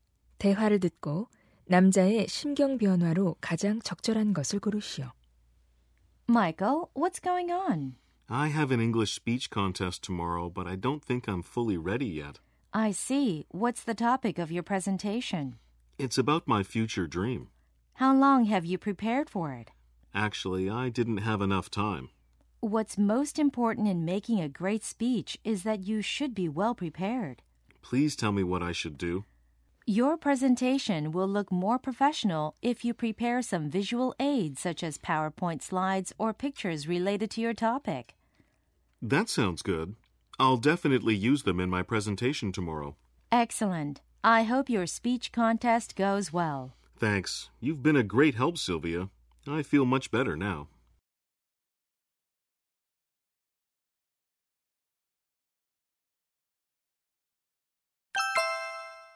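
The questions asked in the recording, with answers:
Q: 대화를 듣고 남자의 심경 변화로 가장 적절한 것을 고르시오.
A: 걱정스러운 → 안심한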